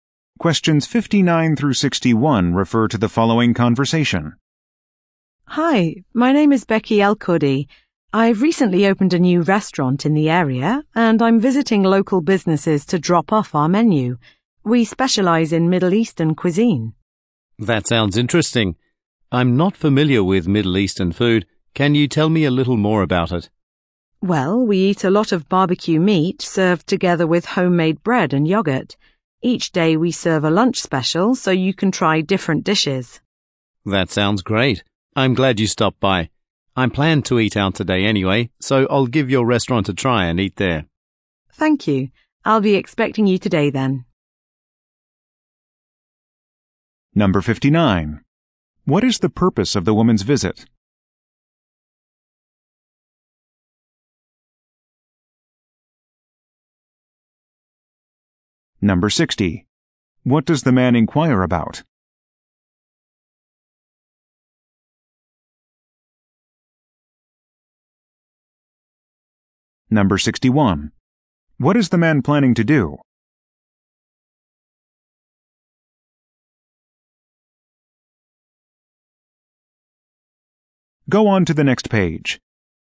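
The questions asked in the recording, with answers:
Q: What is the purpose of the woman's visit?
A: To promote her new restaurant by dropping off a menu

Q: What does the man inquire about?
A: Middle Eastern food

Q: What is the man planning to do?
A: Eat at the woman's restaurant today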